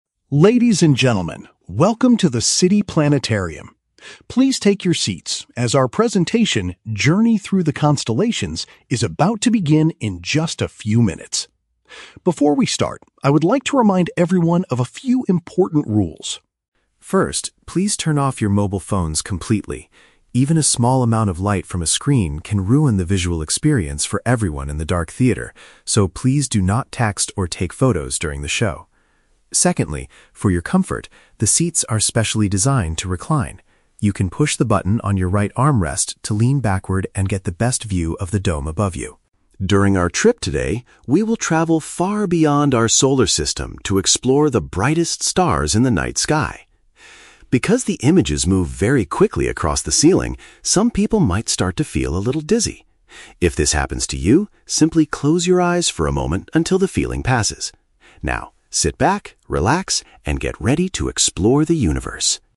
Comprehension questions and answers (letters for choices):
Listen to the announcement at the planetarium. For each question, choose the best answer (A, B, or C).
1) Why does the announcer ask the audience to turn off their mobile phones?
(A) Because the signals can interfere with the theater's equipment.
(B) Because the light from the screens will spoil the dark environment.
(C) Because visitors are encouraged to use professional cameras instead.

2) What are the visitors instructed to do with their seats?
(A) Press a button to lean back and look up comfortably.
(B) Lift the right armrest to create more space for themselves.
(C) Move to a different seat to get a better view of the dome.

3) What advice is given to people who might feel dizzy during the presentation?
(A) They should leave the theater and go outside for fresh air.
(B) They should try to focus their eyes on the brightest stars.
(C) They should shut their eyes briefly until they feel better.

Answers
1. B
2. A
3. C

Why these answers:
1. The announcer says that "light from a screen can ruin the visual experience... in the dark theater." "Ruin" is paraphrased as "spoil". Option A is a plausible reason in places like airplanes or hospitals, but it is not mentioned here. Option C is a trap; the announcer explicitly says "do not... take photos," so cameras are not encouraged.
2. The announcer tells the audience to "push the button on your right armrest to lean backward" to get the best view of the dome. Option B is a trap; the "right armrest" is mentioned, but you push a button on it, you don't lift it. Option C is a trap; the announcer mentions getting "the best view," but that is the result of reclining the seat, not changing to a different seat.
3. The announcer says, "If this happens to you, simply close your eyes for a moment." "Close your eyes for a moment" is paraphrased as "shut their eyes briefly." Option A is plausible but never mentioned. Option B is a trap; the "brightest stars" are mentioned as the topic of the show, not as a cure for dizziness.

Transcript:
Announcer: Ladies and gentlemen, welcome to the City Planetarium. Please take your seats, as our presentation, "Journey Through the Constellations," is about to begin in just a few minutes. Before we start, I would like to remind everyone of a few important rules.
First, please turn off your mobile phones completely. Even a small amount of light from a screen can ruin the visual experience for everyone in the dark theater, so please do not text or take photos during the show. Secondly, for your comfort, the seats are specially designed to recline. You can push the button on your right armrest to lean backward and get the best view of the dome above you.
During our trip today, we will travel far beyond our solar system to explore the brightest stars in the night sky. Because the images move very quickly across the ceiling, some people might start to feel a little dizzy. If this happens to you, simply close your eyes for a moment until the feeling passes. Now, sit back, relax, and get ready to explore the universe!